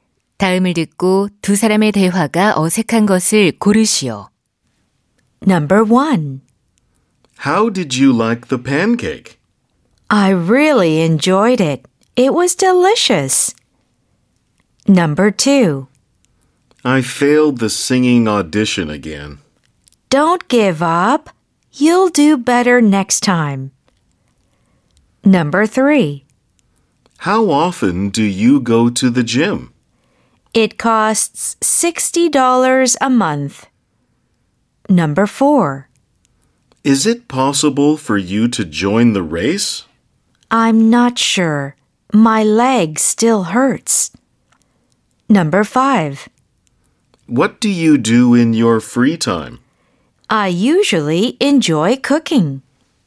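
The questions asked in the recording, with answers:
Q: 다음을 듣고 두 사람의 대화가 어색한 것을 고르시오.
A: 3: How often do you go to the gym? / It costs $60 a month.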